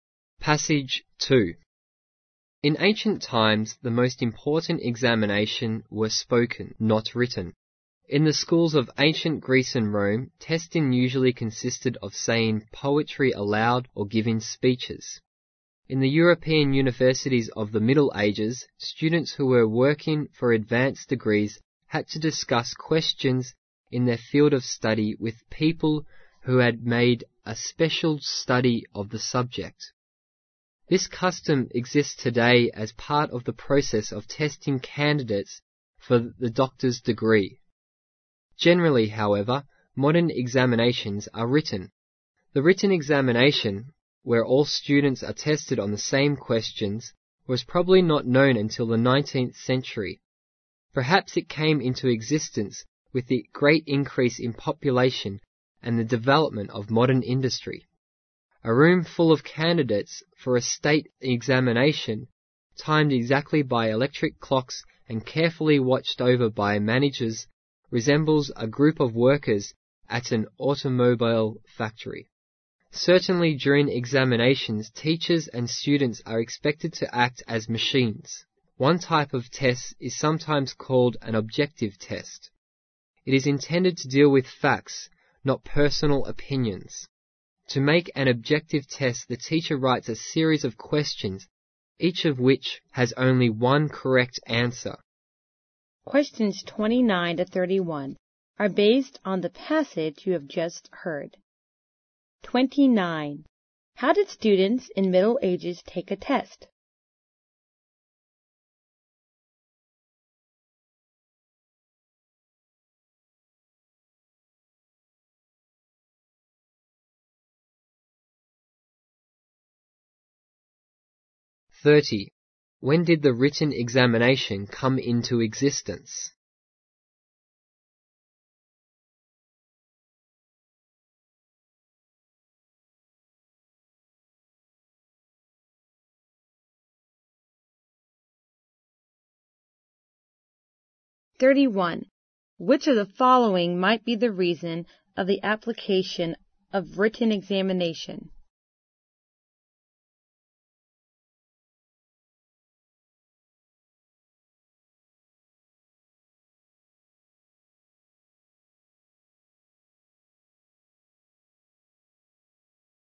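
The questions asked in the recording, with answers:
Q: How did students in Middle Ages take a test?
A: They discussed questions in their field orally with experts

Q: When did the written examination come into existence?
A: Probably in the 19th century

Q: Which of the following might be the reason of the application of written examination?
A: The great increase in population and the development of modern industry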